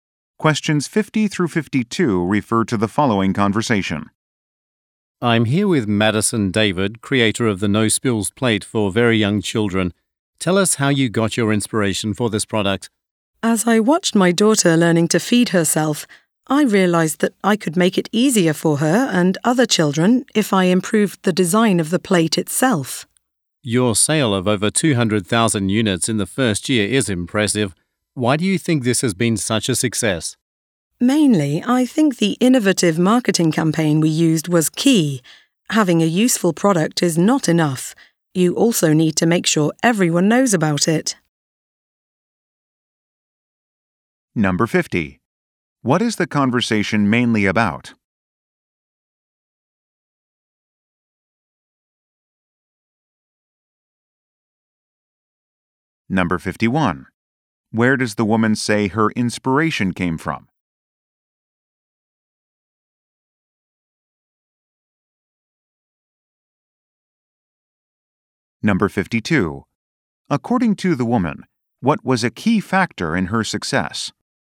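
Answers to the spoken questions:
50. A new product, the No Spills Plate for young children
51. Watching her daughter learn to feed herself
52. An innovative marketing campaign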